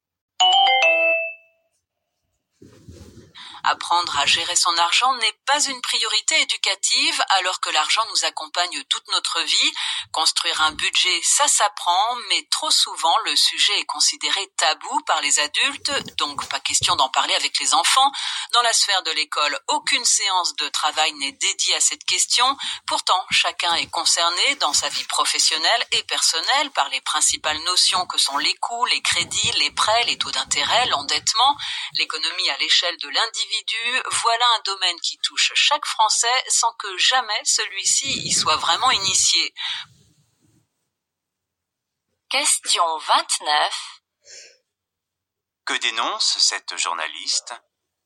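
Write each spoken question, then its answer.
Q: Que dénonce cette journaliste ?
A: On n'apprend pas à gérer son argent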